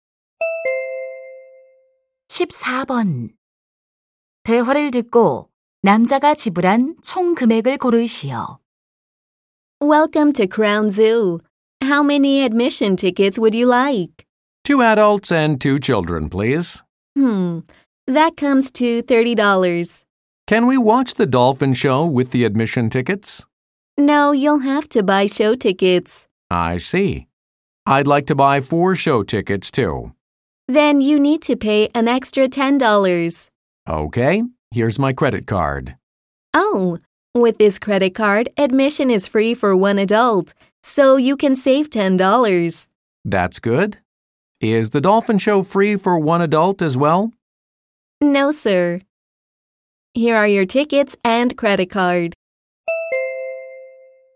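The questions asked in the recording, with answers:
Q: 대화를 듣고 남자가 지불한 총 금액을 고르시오.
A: $30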